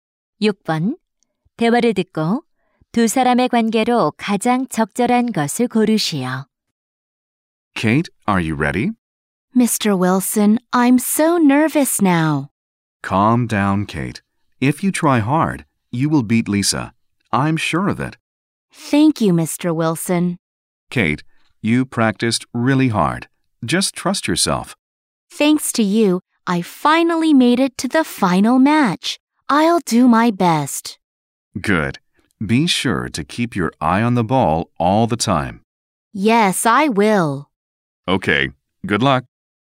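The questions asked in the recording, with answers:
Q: 대화를 듣고 두 사람의 관계로 가장 적절한 것을 고르시오.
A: 코치와 선수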